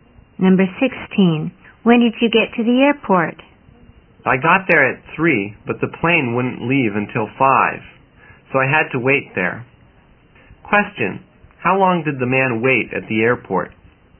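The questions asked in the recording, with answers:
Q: how long did the man wait at the airport?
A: Two hours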